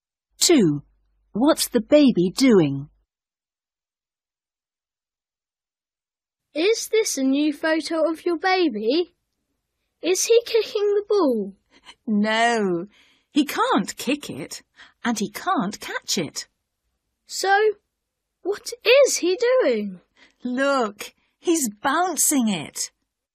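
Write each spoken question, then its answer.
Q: What's the baby doing?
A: Bouncing the ball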